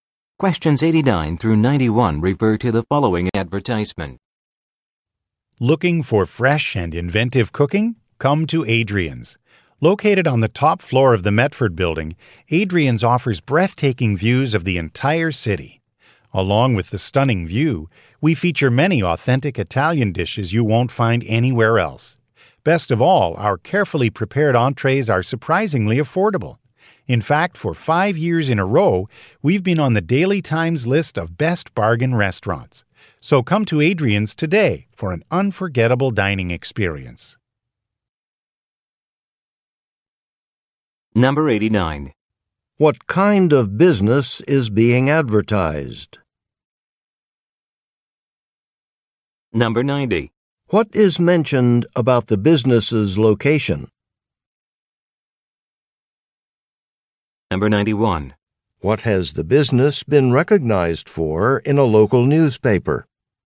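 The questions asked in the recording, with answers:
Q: What kind of business is being advertised?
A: A restaurant

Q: What is mentioned about the business's location?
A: It has breathtaking views of the whole city from the top floor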